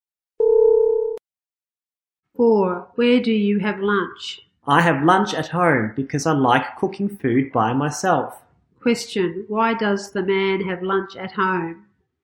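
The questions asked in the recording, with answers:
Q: Why does the man have lunch at home?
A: Because he likes cooking food by himself.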